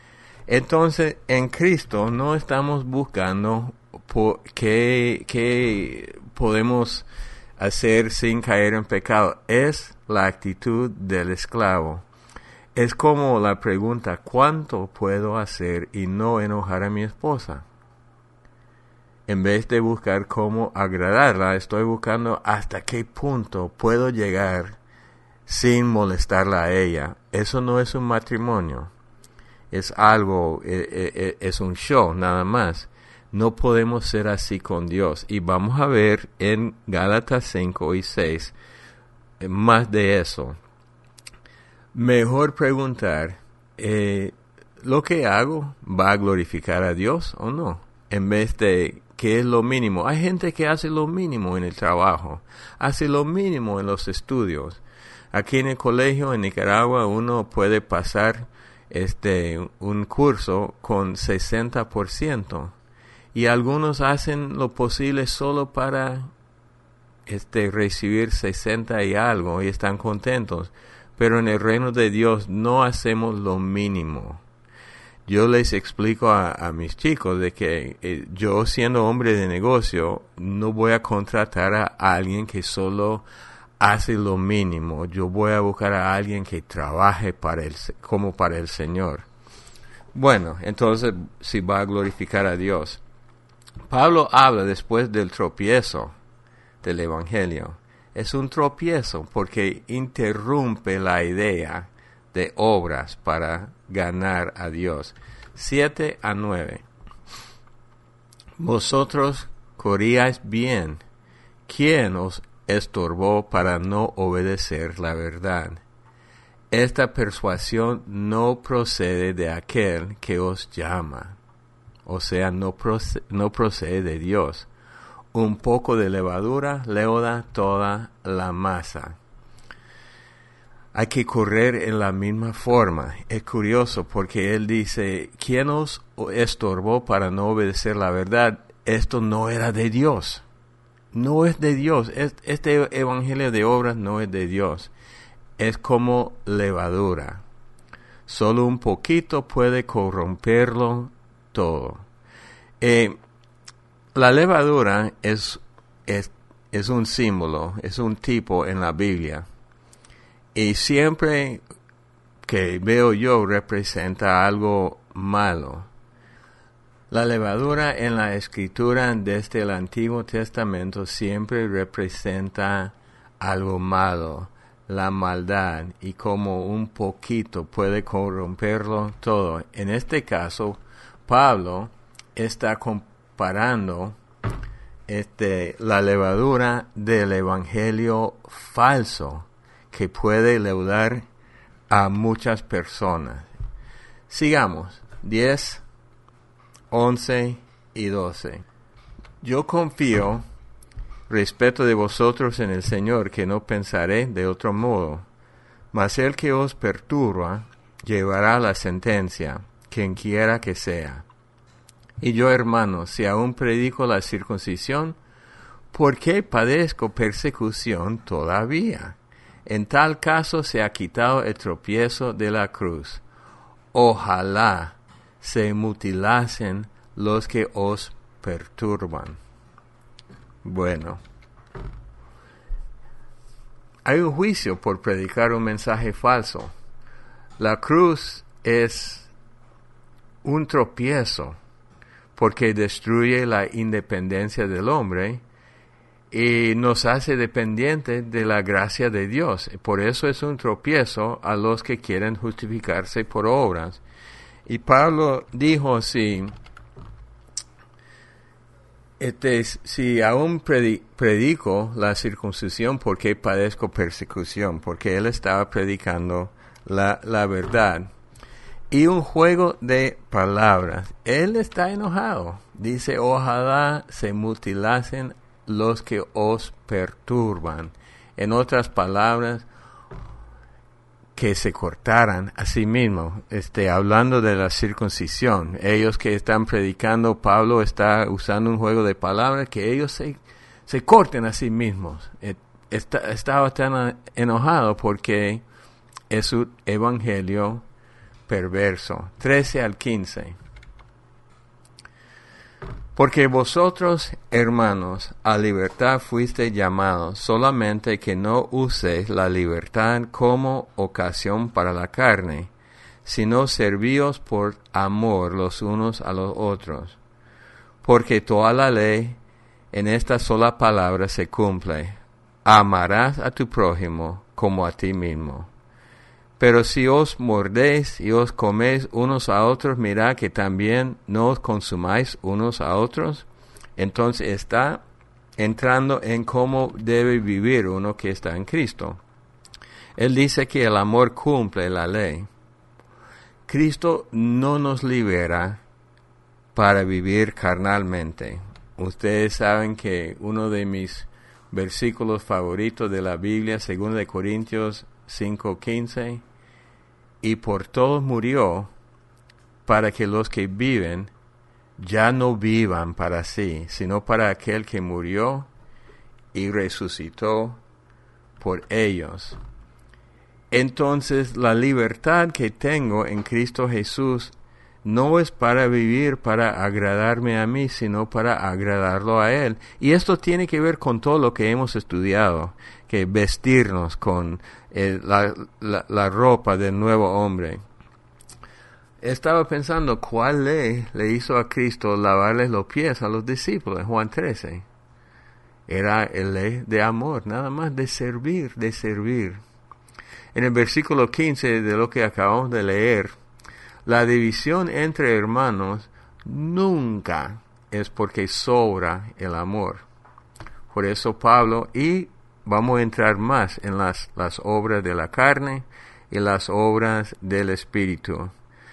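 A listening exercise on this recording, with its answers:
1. ¿Cuánto puedo hacer y no ___________ a mi esposa?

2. Mejor preguntar ¿Va a glorificar a ___________ ?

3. Es como __________ – sólo un _________ puede corromperlo todo.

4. La levadura, en las escrituras, siempre representa la _______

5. v.10-12 – Hay un juicio por predicar un mensaje _________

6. La cruz es un ___________ porque destruye la independencia del hombre.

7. v.13-15 – El __________ cumple la ley.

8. Cristo no nos libera para vivir _____________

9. v.15 – La división entre hermanos nunca es porque _______ el amor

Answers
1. enojar
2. Dios
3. levadura; poquito
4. maldad
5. falso
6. tropiezo
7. amor
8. carnalmente
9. sobra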